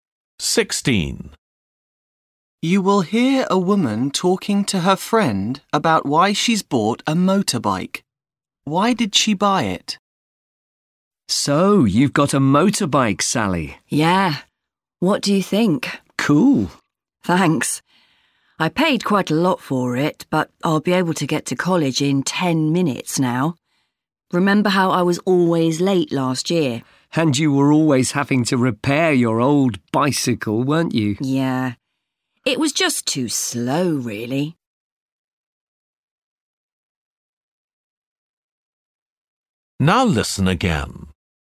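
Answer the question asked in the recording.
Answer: To get to college more quickly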